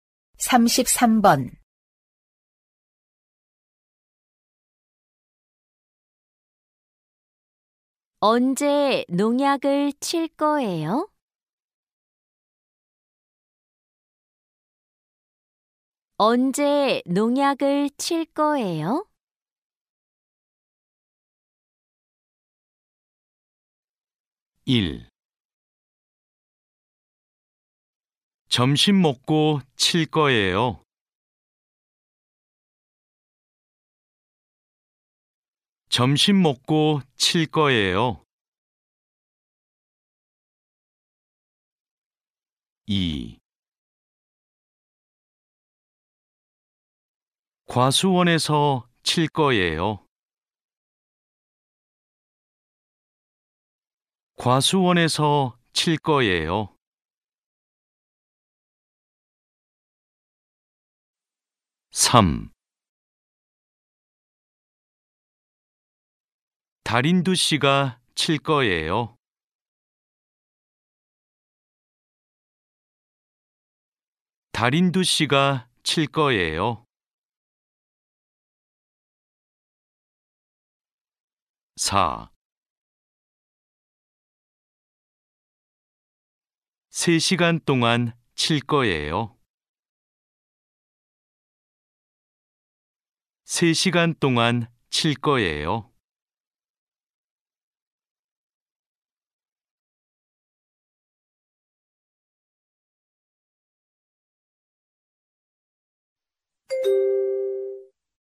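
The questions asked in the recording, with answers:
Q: 언제 농약을 칠 거예요?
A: 1: 점심 먹고 칠 거예요.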